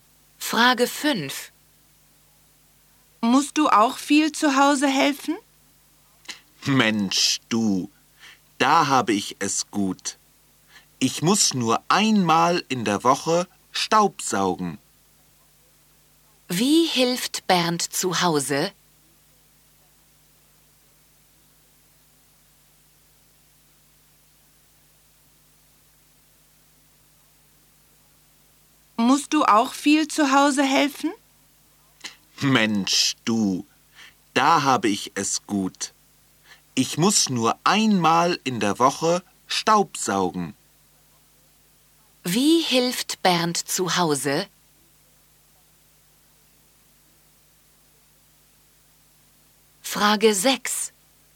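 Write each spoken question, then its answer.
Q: Wie hilft Bernd zu Hause?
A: Er staubsaugt einmal in der Woche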